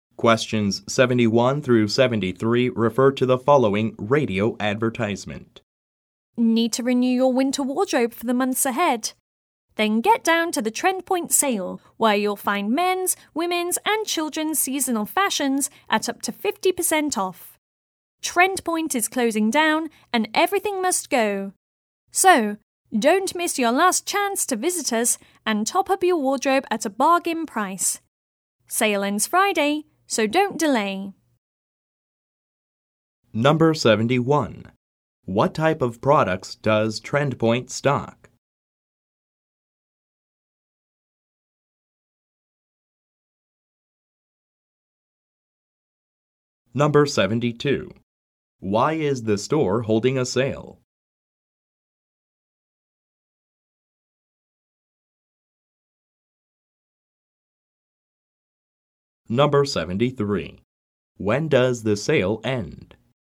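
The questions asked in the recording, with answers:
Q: What type of products does Trendpoint stock?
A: Clothing (seasonal fashions)

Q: Why is the store holding a sale?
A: It is closing down

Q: When does the sale end?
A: Friday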